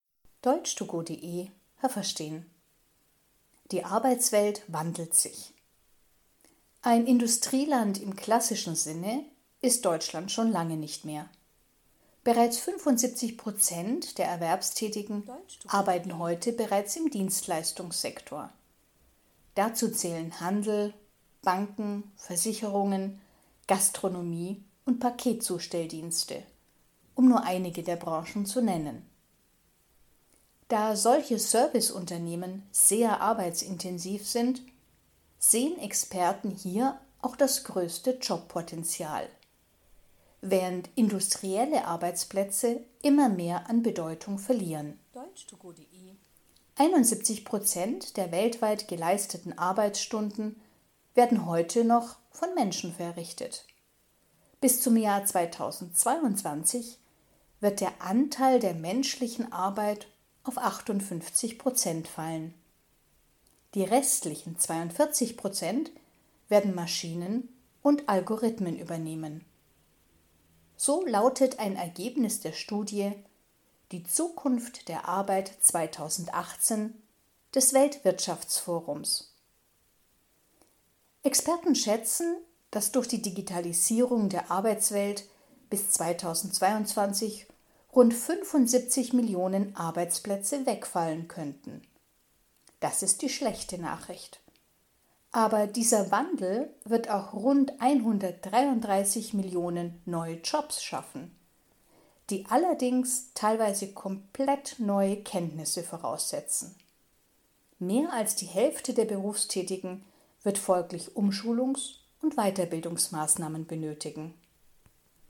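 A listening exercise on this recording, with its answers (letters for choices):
Was haben Sie gehört? Es gibt nur eine korrekte Antwort.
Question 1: In Deutschland arbeiten heute 75 Prozent der Berufstätigen _____ .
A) in der Industrie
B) im Dienstleistungssektor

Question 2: In Zukunft werden in Deutschland immer weniger Menschen _____ arbeiten.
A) in Service-Unternehmen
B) in der Industrie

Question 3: Heute werden _____ der auf der Welt geleisteten Arbeitsstunden von Menschen verrichtet.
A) 17 Prozent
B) 71 Prozent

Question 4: Bis zum Jahr 2022 werden Maschinen und Algorithmen _____ der Arbeit übernehmen.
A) 42 Prozent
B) 58 Prozent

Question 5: Durch die Digitalisierung der Arbeitswelt _____ bis 2022 wahrscheinlich circa 75 Millionen Arbeitsplätze.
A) verschwinden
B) entstehen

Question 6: Durch die Digitalisierung werden circa _____ neue Jobs geschaffen.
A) 133 Millionen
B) 133 Tausend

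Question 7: Das bedeutet, dass Umschulungs- und Weiterbildungsmaßnahmen ...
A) notwendig werden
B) nutzlos sind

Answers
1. B
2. B
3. B
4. A
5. A
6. A
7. A

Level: B2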